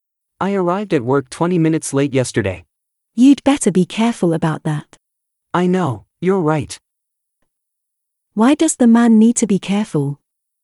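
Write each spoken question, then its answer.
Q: Why does the man need to be careful?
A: He arrived at work 20 minutes late.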